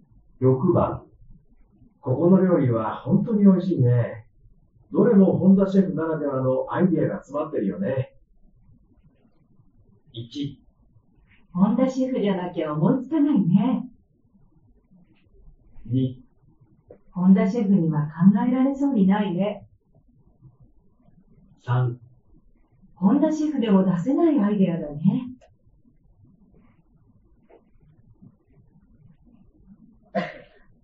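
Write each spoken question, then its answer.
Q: ここの料理は本当に美味しいね。どれも本田シェフならではのアイデアが詰まってるよね。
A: 1: 本田シェフじゃなきゃ思いつかないね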